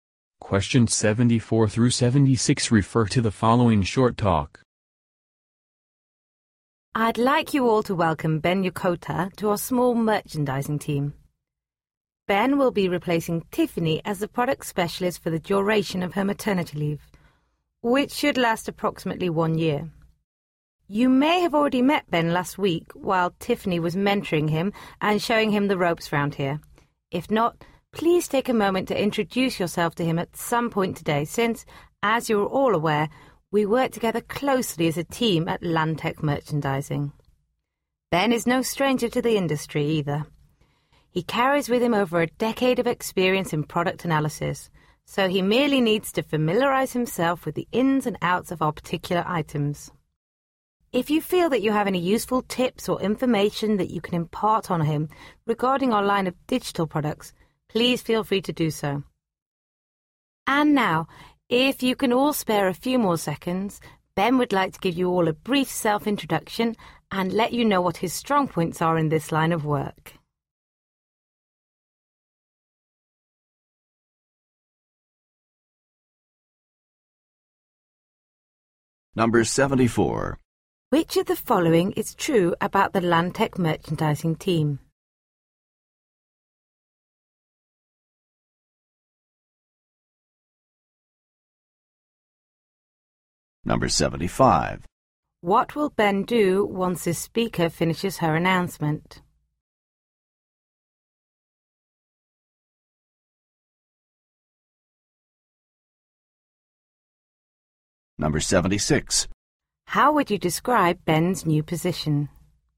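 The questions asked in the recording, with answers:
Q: What will Ben do once his speaker finishes her announcement?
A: Give a brief self-introduction

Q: How would you describe Ben's new position?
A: Temporary (about one year, covering maternity leave)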